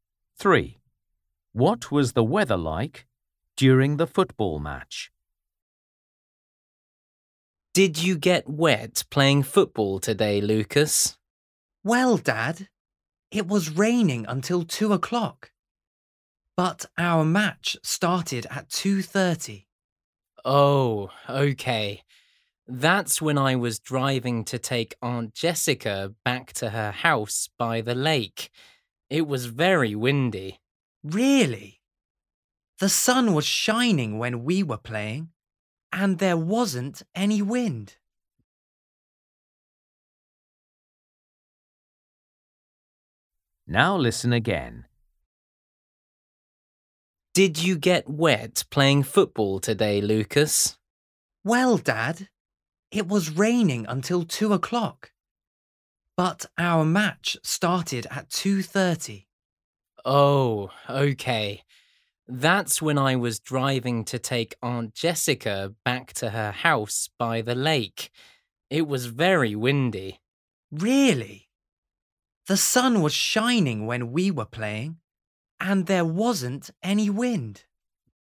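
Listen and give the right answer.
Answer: sunny, with no wind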